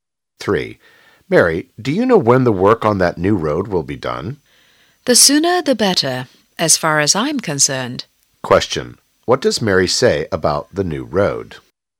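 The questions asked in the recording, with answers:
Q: What does Mary say about the new road?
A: She hopes it will be finished as soon as possible.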